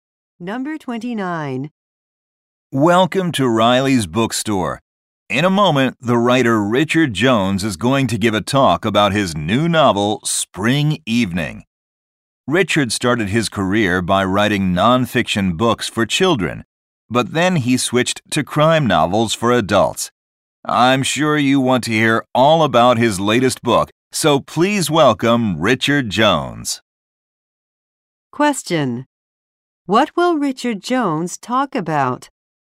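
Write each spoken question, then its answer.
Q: What will Richard Jones talk about?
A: His new novel, Spring Evening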